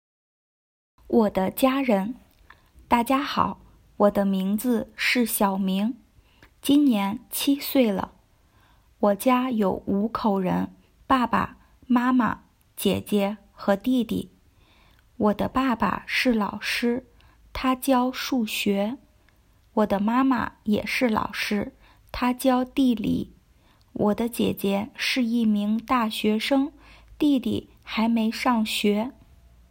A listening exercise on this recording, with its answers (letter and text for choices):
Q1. 我今年几岁了?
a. 七岁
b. 四岁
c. 五岁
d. 六岁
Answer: a. 七岁

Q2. 我的爸爸妈妈做什么工作?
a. 学生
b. 医生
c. 护士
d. 老师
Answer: d. 老师

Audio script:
我的家人 大家好,我的名字是小明,今年七岁了。 我家有五口人,爸爸、妈妈、姐姐和弟弟。 我的爸爸是老师,他教数学。我的妈妈也是老师,她教地理。 我的姐姐是一名大学生,弟弟还没上学。